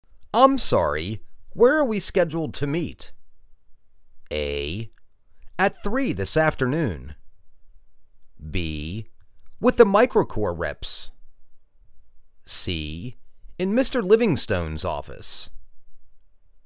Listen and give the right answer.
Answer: In Mr. Livingstone's office.